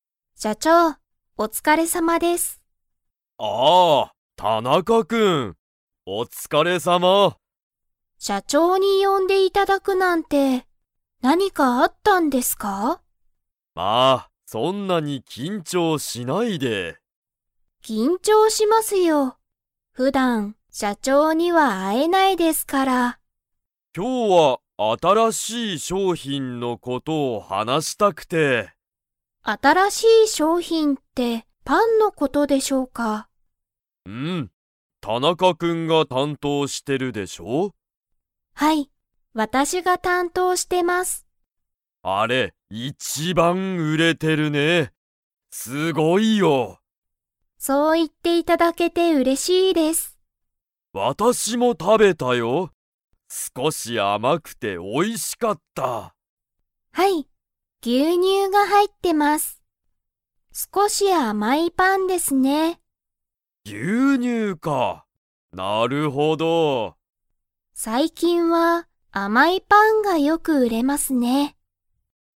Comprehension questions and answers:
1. 「新あたらしい商品しょうひん」とは、何なんですか?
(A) スマホ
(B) パン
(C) ケーキ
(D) 牛乳ぎゅうにゅう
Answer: (B) パン

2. 新あたらしい商品しょうひんは 。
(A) 売うれている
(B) 売うれていない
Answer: (A) 売うれている

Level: Level 4

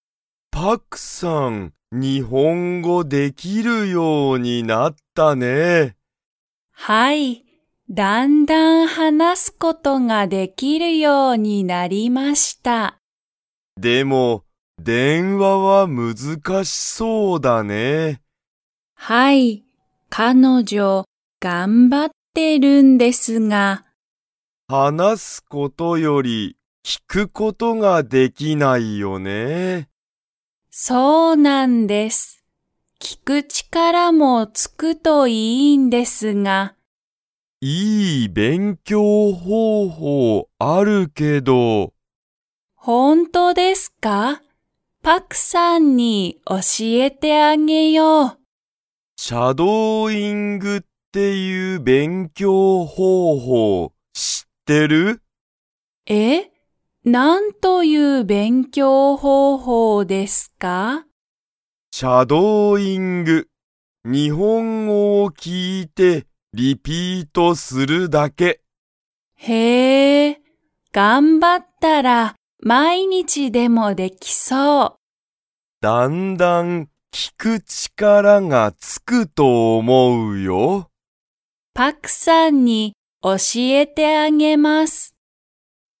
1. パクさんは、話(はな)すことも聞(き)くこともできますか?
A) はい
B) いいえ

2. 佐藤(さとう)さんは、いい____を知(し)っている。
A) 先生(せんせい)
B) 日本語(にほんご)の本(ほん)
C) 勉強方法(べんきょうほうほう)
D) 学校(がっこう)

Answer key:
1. B) いいえ
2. C) 勉強方法(べんきょうほうほう)

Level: Level 2

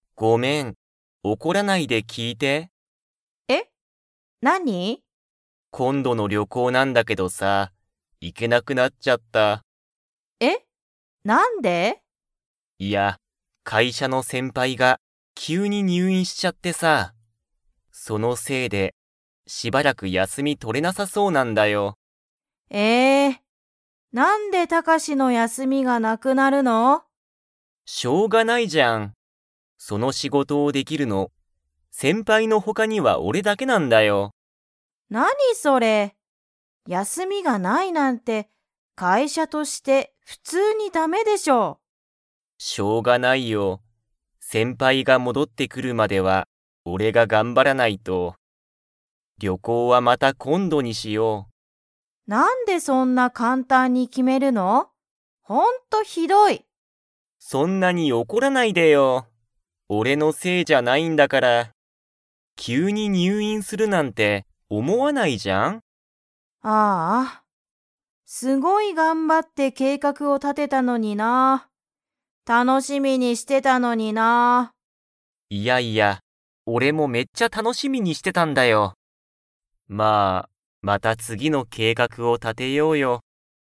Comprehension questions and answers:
Comprehension Quiz (Skip if you don't understand the conversation yet)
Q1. 二人ふたりは旅行りょこうに 。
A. 行いける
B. 行いけない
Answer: B. 行いけない

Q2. タカシの先輩せんぱいは、何なにをしましたか?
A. 入院にゅういん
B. 旅行りょこう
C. 仕事しごと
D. 計画けいかく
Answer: A. 入院にゅういん

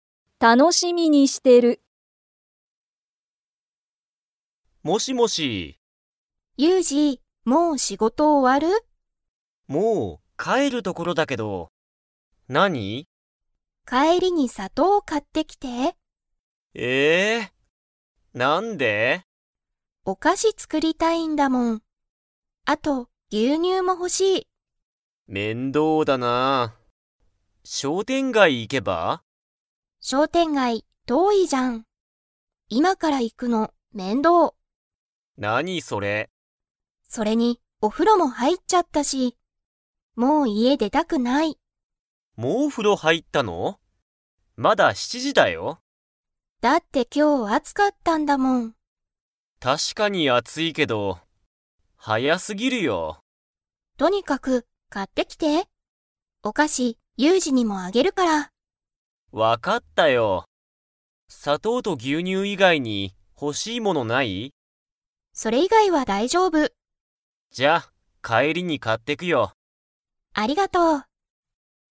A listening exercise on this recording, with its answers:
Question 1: けいこは何なにを作つくりたいですか?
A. ご飯はん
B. ジュース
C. 牛乳ぎゅうにゅう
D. お菓子かし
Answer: D. お菓子かし

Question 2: けいこはお風呂ふろに 。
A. 入はいった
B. 入はいってない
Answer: A. 入はいった

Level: Level 4

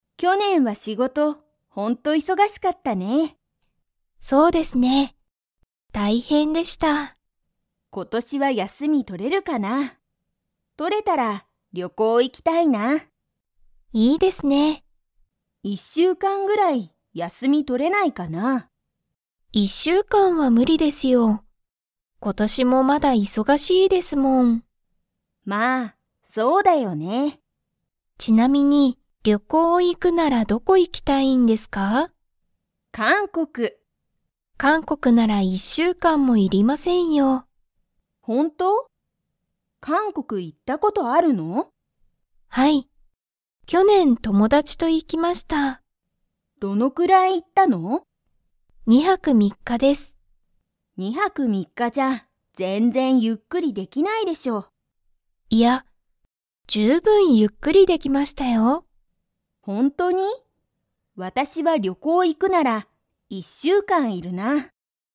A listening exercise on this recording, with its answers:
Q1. 今年ことしもまだ忙いそがしいですか?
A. はい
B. いいえ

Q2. たかこは、旅行りょこうに行いくなら 要いる。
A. 2日ふつか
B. 3日みっか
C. 一週間いっしゅうかん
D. 二週間にしゅうかん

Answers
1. A. はい
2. C. 一週間いっしゅうかん

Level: Level 4

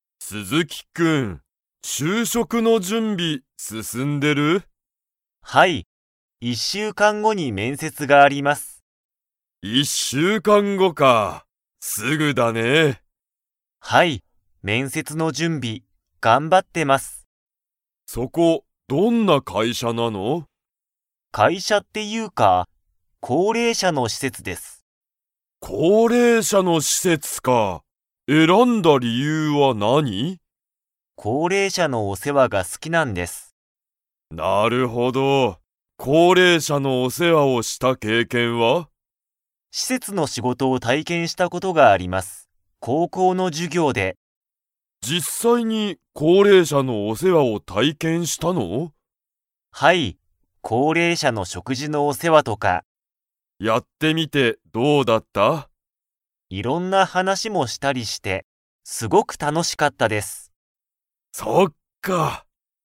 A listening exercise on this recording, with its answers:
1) 面接めんせつは、いつありますか?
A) 一週間(いっしゅうかん)後ご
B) 二週間にしゅうかん後ご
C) 一週間(いっしゅうかん)前まえ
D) 二週間にしゅうかん前まえ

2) 鈴木すずきくんは、高齢者こうれいしゃのお世話せわを体験たいけんしたことが 。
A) ある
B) ない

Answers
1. A) 一週間(いっしゅうかん)後ご
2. A) ある

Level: Level 4

